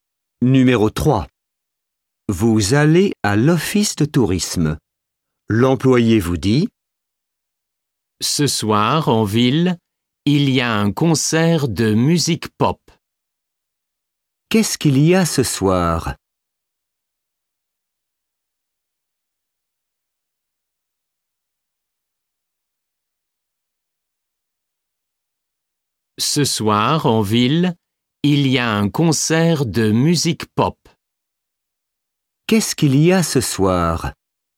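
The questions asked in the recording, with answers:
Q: Qu'est-ce qu'il y a ce soir?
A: Un concert de musique pop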